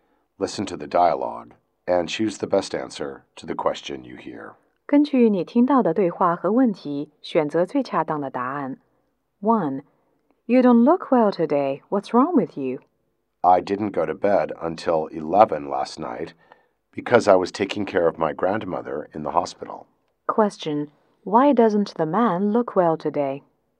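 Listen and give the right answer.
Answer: He went to bed late taking care of his grandmother in hospital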